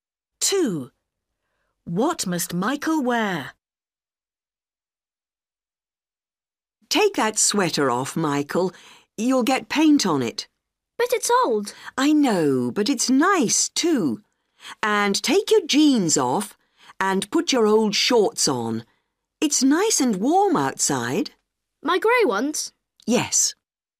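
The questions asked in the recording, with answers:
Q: What must Michael wear?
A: his old grey shorts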